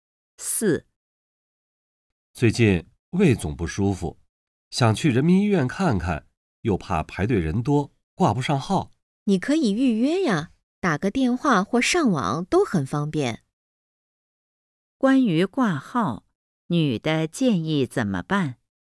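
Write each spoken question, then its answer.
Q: 关于挂号,女的建议怎么办?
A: 打电话或上网预约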